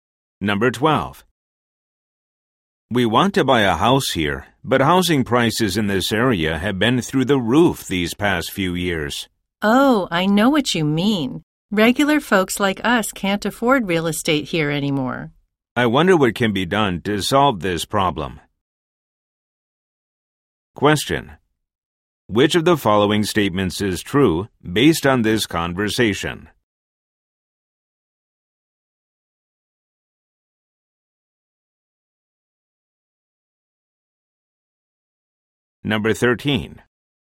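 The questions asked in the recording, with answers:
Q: Which of the following statements is true based on this conversation?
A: Housing prices in the area have become too high for ordinary people to afford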